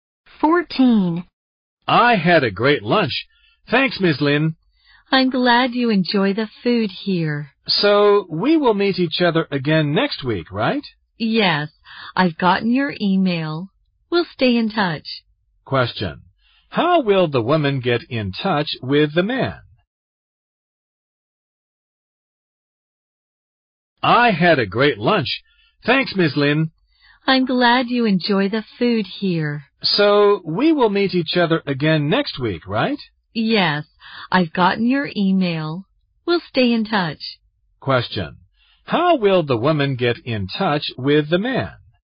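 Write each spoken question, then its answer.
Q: How will the woman get in touch with the man?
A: By email.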